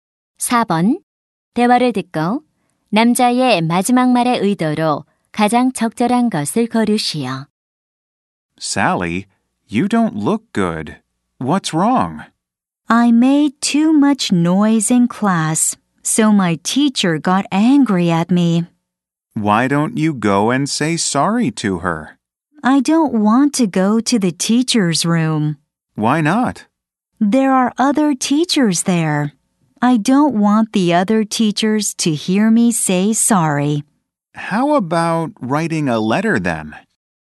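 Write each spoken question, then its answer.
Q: 대화를 듣고 남자의 마지막 말의 의도로 가장 적절한 것을 고르시오.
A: 제안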